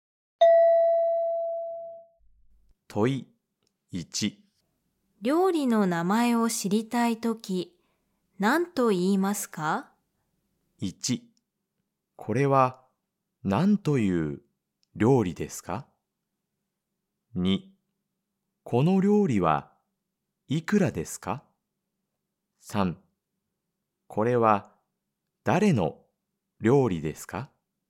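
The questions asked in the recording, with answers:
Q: 料理の名前を知りたいとき、何と言いますか?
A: 1: これは何という料理ですか?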